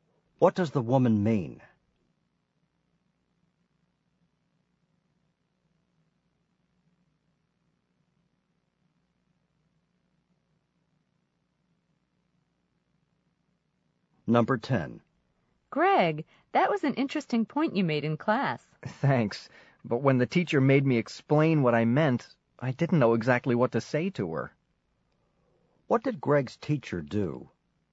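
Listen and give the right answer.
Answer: She made him explain what he meant.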